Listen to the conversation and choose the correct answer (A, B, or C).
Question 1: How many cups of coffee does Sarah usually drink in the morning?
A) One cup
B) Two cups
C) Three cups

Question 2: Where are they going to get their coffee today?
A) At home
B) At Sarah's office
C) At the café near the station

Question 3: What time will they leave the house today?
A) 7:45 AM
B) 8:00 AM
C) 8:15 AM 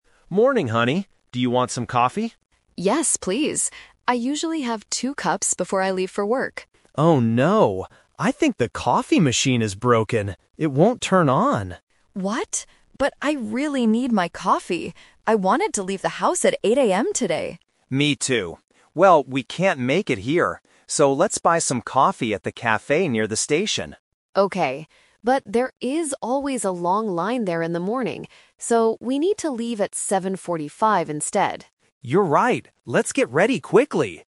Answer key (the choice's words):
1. Two cups
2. At the café near the station
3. 7:45 AM

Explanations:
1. Sarah says, "I usually have two cups before I leave for work." Options A and C are not mentioned in the conversation.
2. Mark says, "So, let's buy some coffee at the café near the station," and Sarah agrees. Option A (At home) is a trap because they usually drink it there, but they can't today because the machine is broken. Option B is not mentioned.
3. Sarah says, "So, we need to leave at 7:45 instead." Option B (8:00 AM) is a trap because that was the time she wanted to leave, but they have to leave earlier because there is a long line at the café. Option C is not mentioned.

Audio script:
Mark: Morning, honey. Do you want some coffee?
Sarah: Yes, please. I usually have two cups before I leave for work.
Mark: Oh no. I think the coffee machine is broken. It won't turn on.
Sarah: What? But I really need my coffee! I wanted to leave the house at 8:00 AM today.
Mark: Me too. Well, we can't make it here. So, let's buy some coffee at the café near the station.
Sarah: Okay. But there is always a long line there in the morning. So, we need to leave at 7:45 instead.